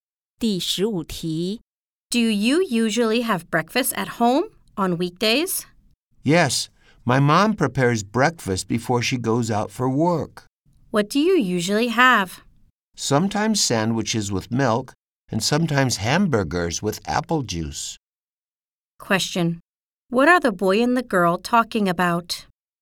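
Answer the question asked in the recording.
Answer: Breakfast on weekdays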